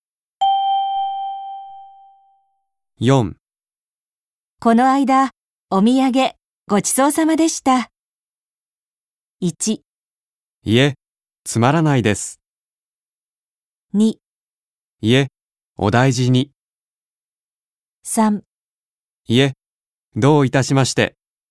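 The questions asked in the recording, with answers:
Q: この間、お土産、ごちそうさまでした。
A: 3: いえ、どういたしまして。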